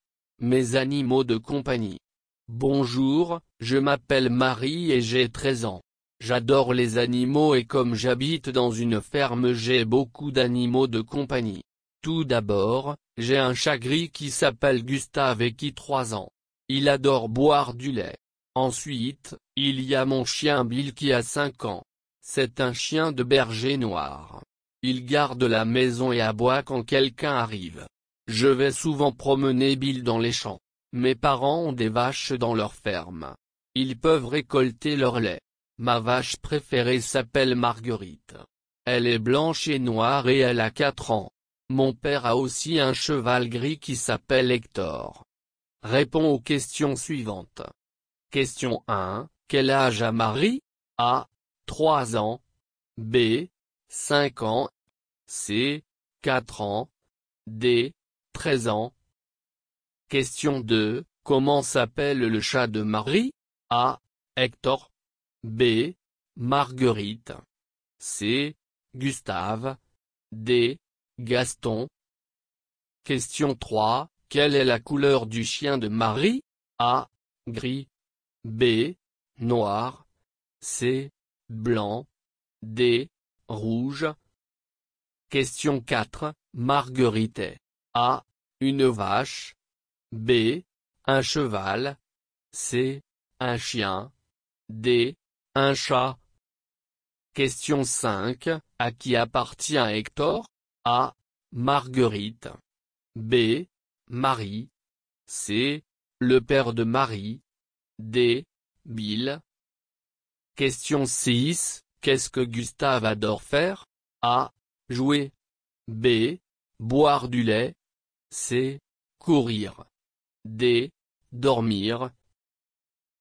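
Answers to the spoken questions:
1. D: 13 ans
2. C: Gustave
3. B: Noir
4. A: Une vache
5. C: Le père de Marie
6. B: Boire du lait

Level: Basis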